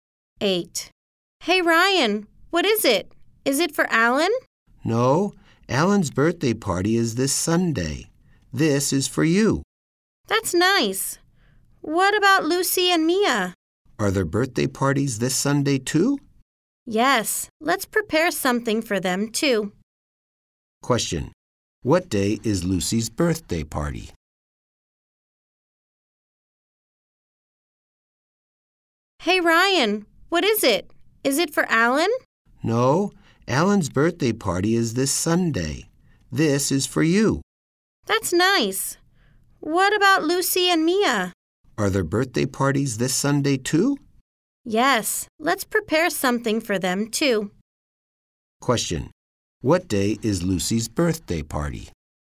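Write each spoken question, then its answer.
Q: What day is Lucy's birthday party?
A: Sunday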